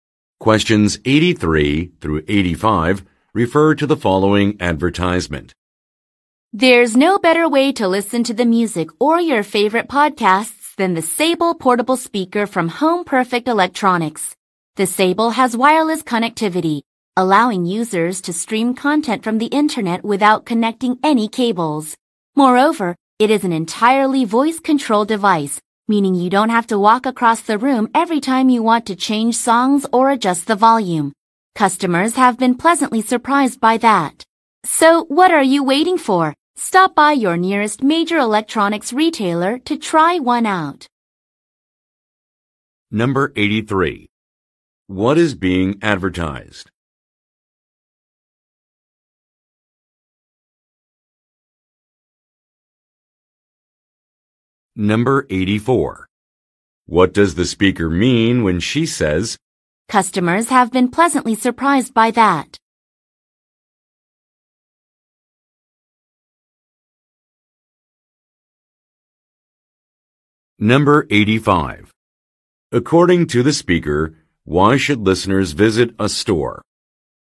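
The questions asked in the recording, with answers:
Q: What is being advertised?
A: A portable speaker

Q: According to the speaker, why should listeners visit a store?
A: To try out the speaker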